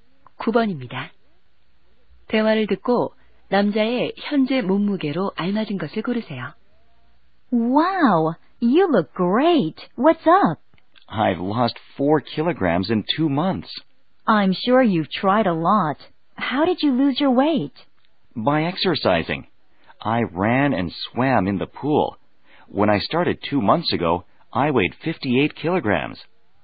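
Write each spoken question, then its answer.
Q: 대화를 듣고 남자의 현재 몸무게로 알맞은 것을 고르세요.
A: 54킬로그램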